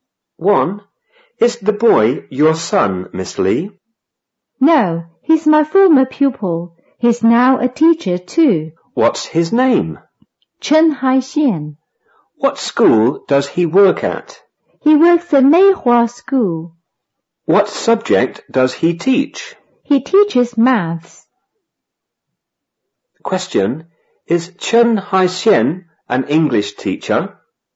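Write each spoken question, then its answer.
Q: Question, is Chen Haixian an English teacher?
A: No, he teaches maths.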